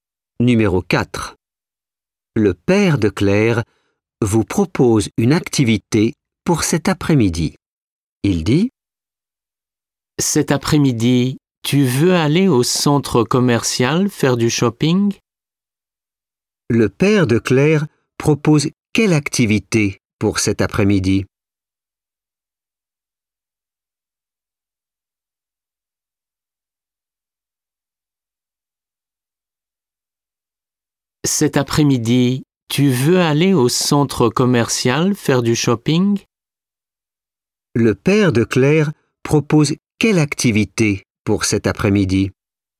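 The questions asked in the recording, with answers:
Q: Le père de Claire propose quelle activité pour cet après-midi?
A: Faire du shopping au centre commercial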